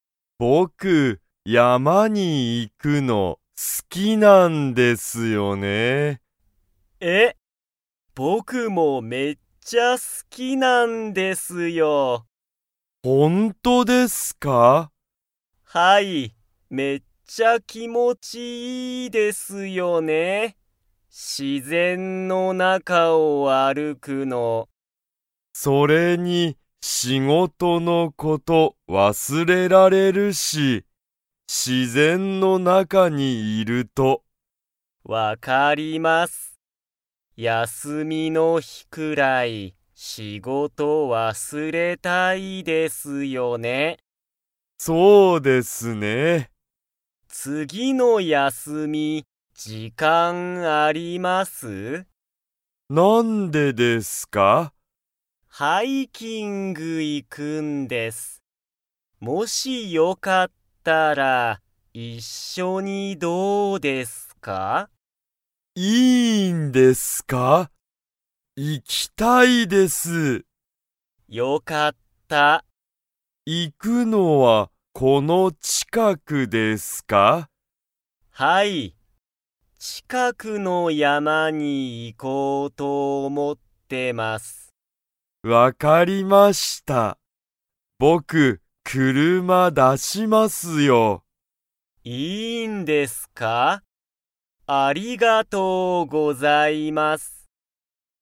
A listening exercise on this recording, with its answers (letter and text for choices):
Comprehension Quiz (Skip if you don't understand the conversation yet)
有田(ありた)さんと高峰(たかみね)さんは、____ハイキングに行(い)く。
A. 今日きょう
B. 明日あした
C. 次つぎの休やすみ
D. 次つぎの日ひ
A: C. 次つぎの休やすみ

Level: Level 2